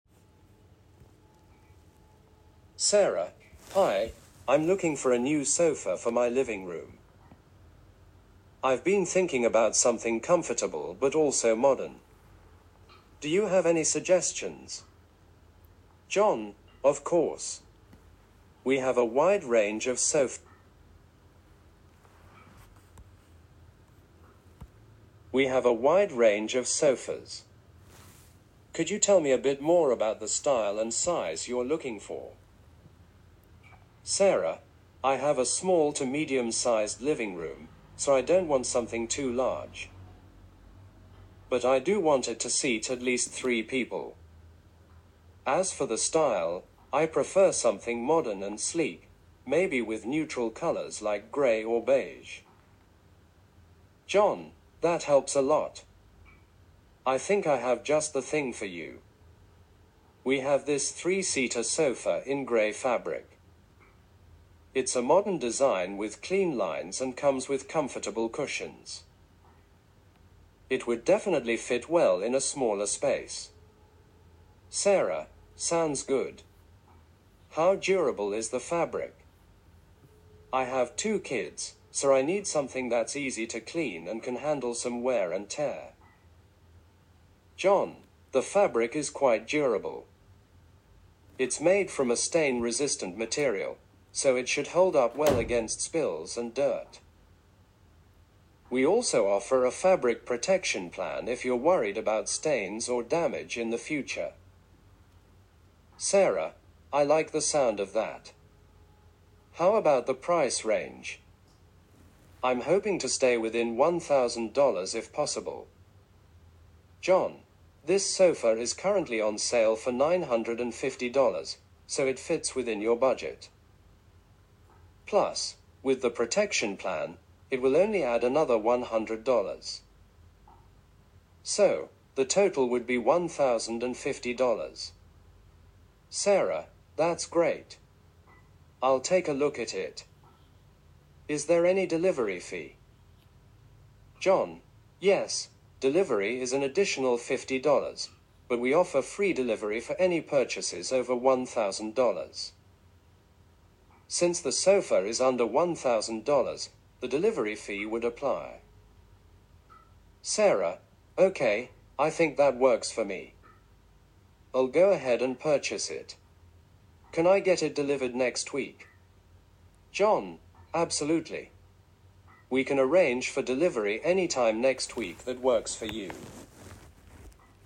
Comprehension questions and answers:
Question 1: What type of sofa is Sarah looking for?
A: A modern and sleek three-seater sofa

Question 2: What color scheme does Sarah prefer for the sofa?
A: Neutral colors like grey or beige

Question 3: What is Sarah's main concern about the sofa fabric?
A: She is concerned about its durability and ease of cleaning.

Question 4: How much is the sofa Sarah is interested in?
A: $950

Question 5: What is the additional cost for the fabric protection plan?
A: $100

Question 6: What is the delivery fee for the sofa?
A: $50

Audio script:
Sarah:
Hi, I'm looking for a new sofa for my living room. I've been thinking about something comfortable but also modern. Do you have any suggestions?
John:
Of course! We have a wide range of sofas. Could you tell me a bit more about the style and size you're looking for?
Sarah:
I have a small to medium-sized living room, so I don't want something too large. But I do want it to seat at least three people. As for the style, I prefer something modern and sleek, maybe with neutral colors like grey or beige.
John:
That helps a lot! I think I have just the thing for you. We have this three-seater sofa in grey fabric. It's a modern design with clean lines and comes with comfortable cushions. It would definitely fit well in a smaller space.
Sarah:
Sounds good. How durable is the fabric? I have two kids, so I need something that's easy to clean and can handle some wear and tear.
John:
The fabric is quite durable. It's made from a stain-resistant material, so it should hold up well against spills and dirt. We also offer a fabric protection plan if you're worried about stains or damage in the future.
Sarah:
I like the sound of that. How about the price range? I'm hoping to stay within $1,000 if possible.
John:
This sofa is currently on sale for $950, so it fits within your budget. Plus, with the protection plan, it will only add another $100. So, the total would be $1,050.
Sarah:
That's great! I'll take a look at it. Is there any delivery fee?
John:
Yes, delivery is an additional $50, but we offer free delivery for any purchases over $1,000. Since the sofa is under $1,000, the delivery fee would apply.
Sarah:
Okay, I think that works for me. I'll go ahead and purchase it. Can I get it delivered next week?
John:
Absolutely! We can arrange for delivery anytime next week that works for you.